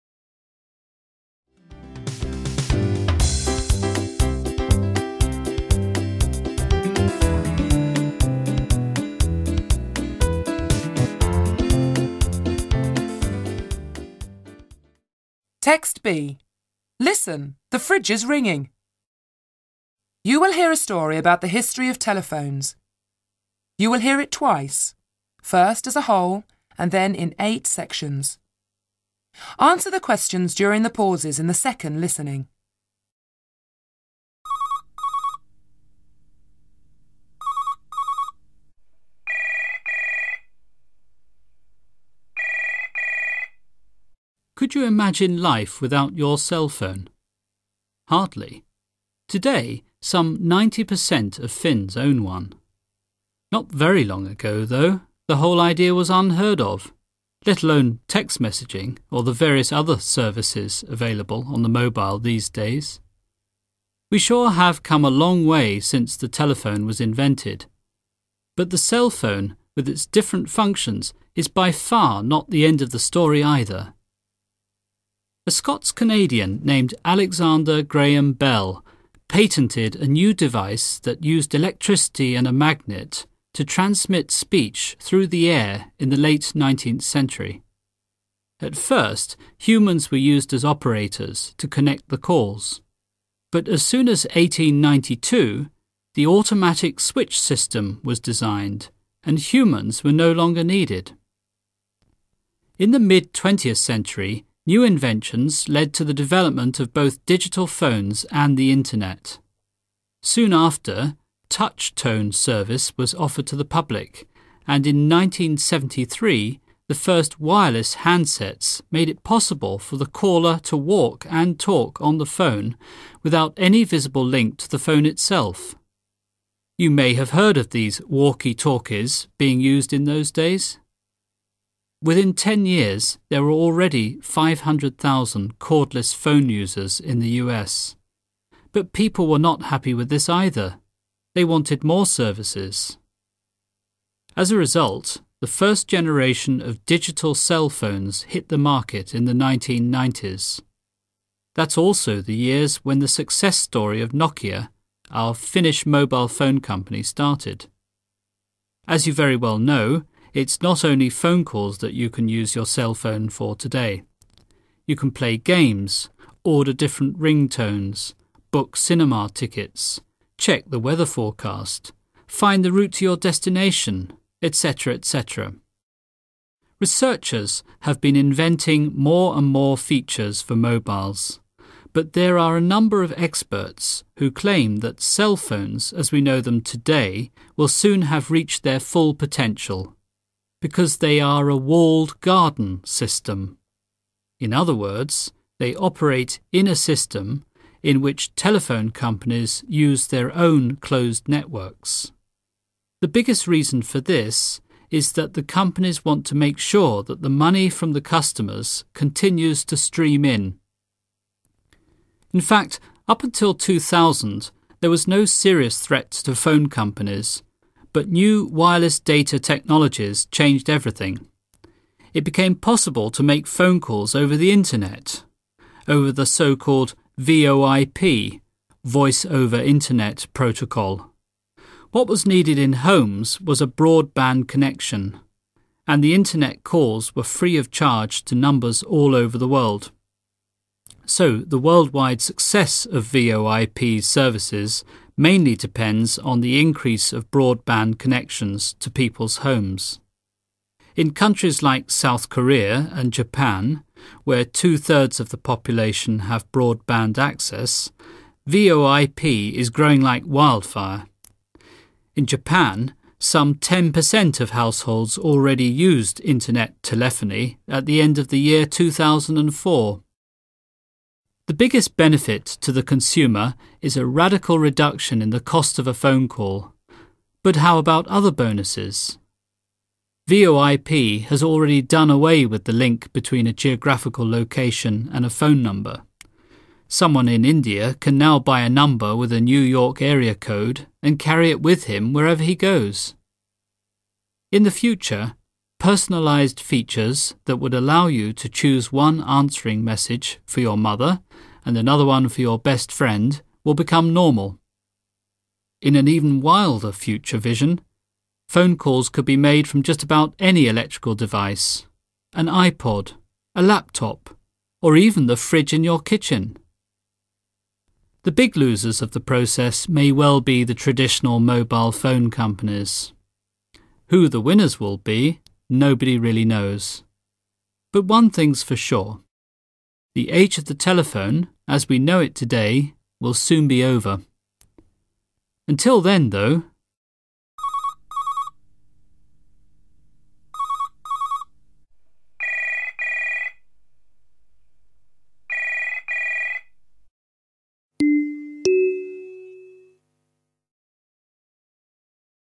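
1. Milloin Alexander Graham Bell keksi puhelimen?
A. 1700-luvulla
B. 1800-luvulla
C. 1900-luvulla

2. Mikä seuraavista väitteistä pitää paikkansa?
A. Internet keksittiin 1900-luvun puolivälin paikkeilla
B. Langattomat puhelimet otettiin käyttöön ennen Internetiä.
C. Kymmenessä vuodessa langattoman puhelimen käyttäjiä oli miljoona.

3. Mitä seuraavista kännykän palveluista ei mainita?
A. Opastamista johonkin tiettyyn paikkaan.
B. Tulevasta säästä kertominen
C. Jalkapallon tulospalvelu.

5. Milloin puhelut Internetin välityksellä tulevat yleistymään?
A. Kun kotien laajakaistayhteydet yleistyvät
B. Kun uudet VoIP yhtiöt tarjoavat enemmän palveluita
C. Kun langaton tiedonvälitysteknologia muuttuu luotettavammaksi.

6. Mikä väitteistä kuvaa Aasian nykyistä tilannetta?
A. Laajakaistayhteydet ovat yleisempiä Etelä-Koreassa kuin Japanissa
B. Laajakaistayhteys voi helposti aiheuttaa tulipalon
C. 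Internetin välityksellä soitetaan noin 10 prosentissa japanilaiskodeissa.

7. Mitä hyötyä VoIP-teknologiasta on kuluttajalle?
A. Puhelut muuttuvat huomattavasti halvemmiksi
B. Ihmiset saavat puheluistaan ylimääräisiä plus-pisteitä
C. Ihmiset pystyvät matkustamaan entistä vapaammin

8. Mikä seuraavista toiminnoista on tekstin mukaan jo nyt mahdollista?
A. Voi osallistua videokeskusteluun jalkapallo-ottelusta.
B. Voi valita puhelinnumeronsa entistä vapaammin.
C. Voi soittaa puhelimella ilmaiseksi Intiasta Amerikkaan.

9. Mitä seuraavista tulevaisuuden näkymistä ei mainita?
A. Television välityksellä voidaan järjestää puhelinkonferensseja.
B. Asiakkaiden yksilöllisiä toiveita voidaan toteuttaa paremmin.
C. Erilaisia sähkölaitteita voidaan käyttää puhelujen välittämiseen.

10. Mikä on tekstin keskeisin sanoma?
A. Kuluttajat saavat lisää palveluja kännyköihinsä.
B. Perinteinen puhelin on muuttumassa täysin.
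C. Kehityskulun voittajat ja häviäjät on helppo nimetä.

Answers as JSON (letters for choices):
{"1": "B", "2": "A", "3": "C", "5": "A", "6": "C", "7": "A", "8": "B", "9": "A", "10": "B"}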